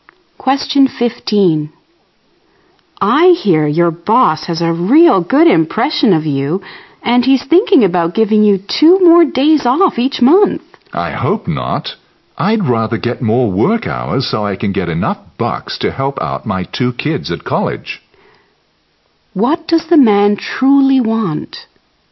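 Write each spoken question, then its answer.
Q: What does the man truly want?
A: More work hours to earn more money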